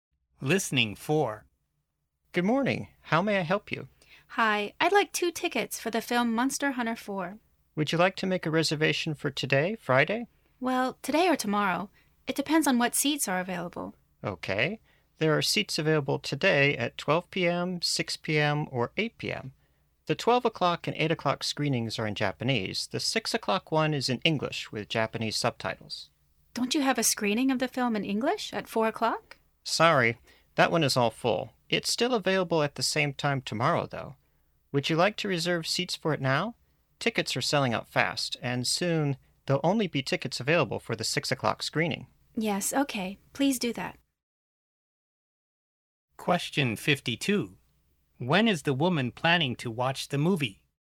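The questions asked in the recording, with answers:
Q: When is the woman planning to watch the movie?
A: Tomorrow (Saturday) at 4 o'clock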